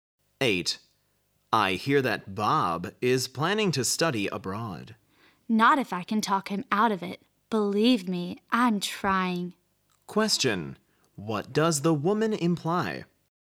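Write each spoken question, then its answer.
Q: What does the woman imply?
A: She is trying to persuade Bob not to study abroad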